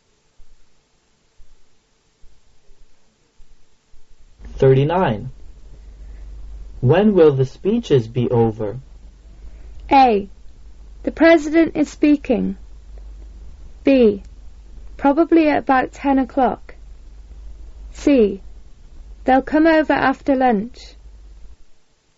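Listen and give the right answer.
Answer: B: Probably at about 10 o'clock.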